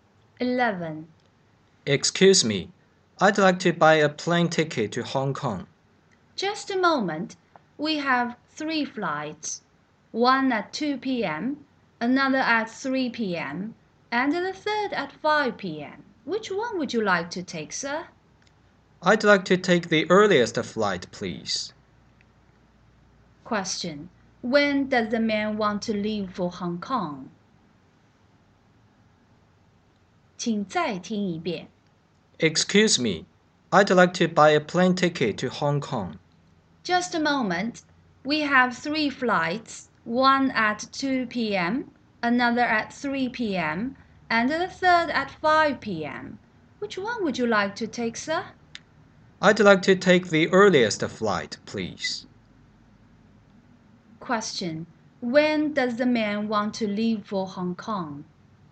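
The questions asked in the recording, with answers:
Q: Question. When does the man want to leave for Hong Kong?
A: At 2 p.m.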